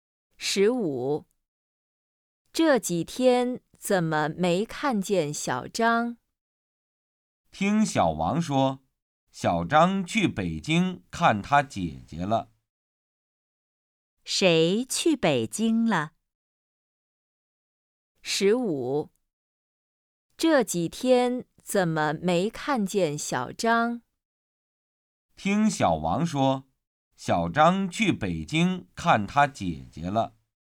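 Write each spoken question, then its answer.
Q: 谁去北京了?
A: 小张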